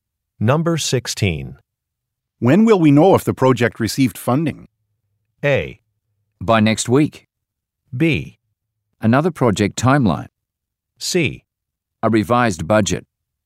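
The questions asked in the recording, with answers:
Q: When will we know if the project received funding?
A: A: By next week.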